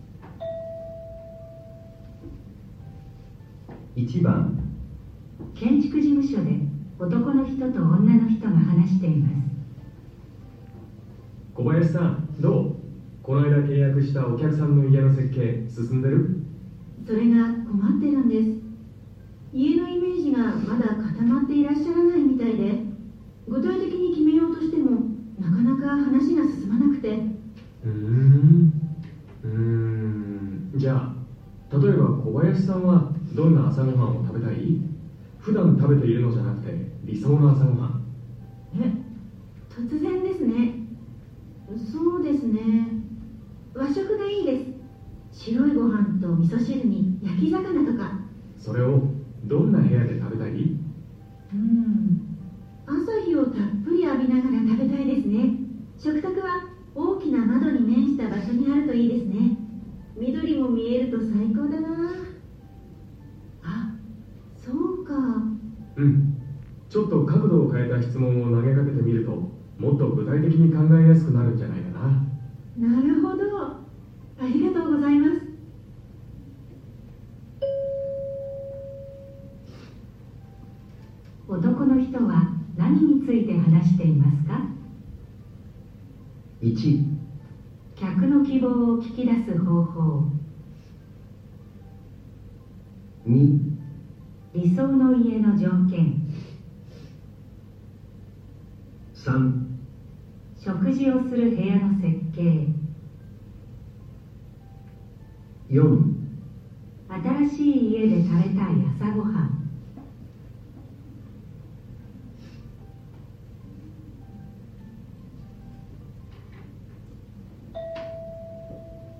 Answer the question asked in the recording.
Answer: 1

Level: N1 Listening · Test 1